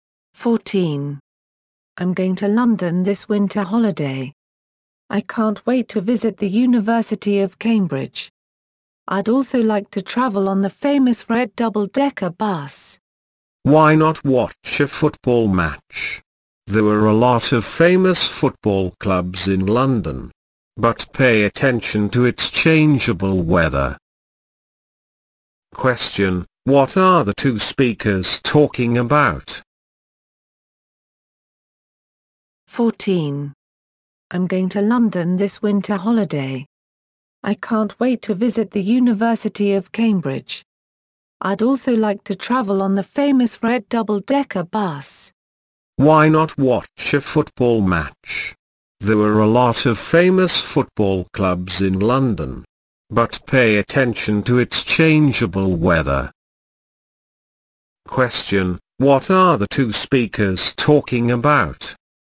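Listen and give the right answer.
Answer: A trip to London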